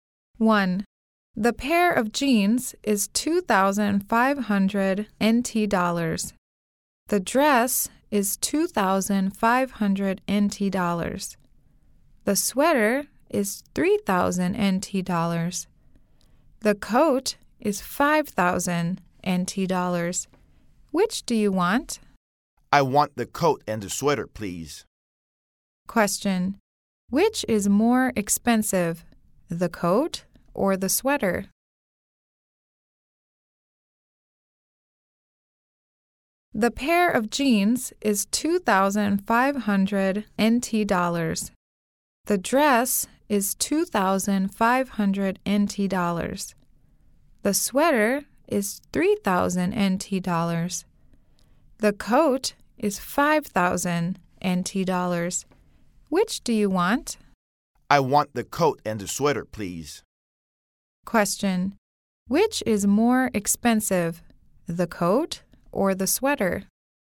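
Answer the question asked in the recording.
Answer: The coat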